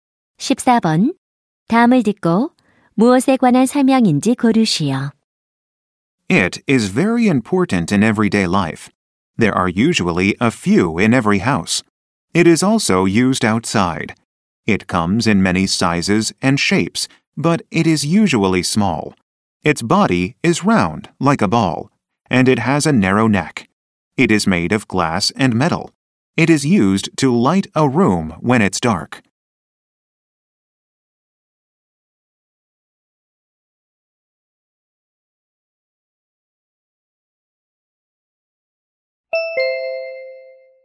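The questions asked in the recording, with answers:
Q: 다음을 듣고 무엇에 관한 설명인지 고르시오.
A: 전구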